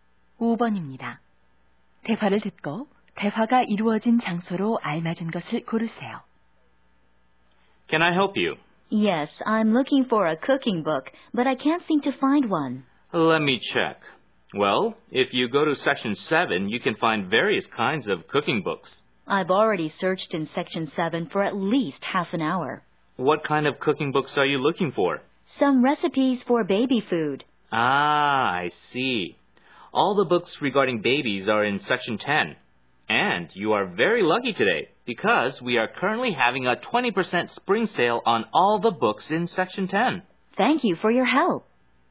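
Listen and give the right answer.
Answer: 서점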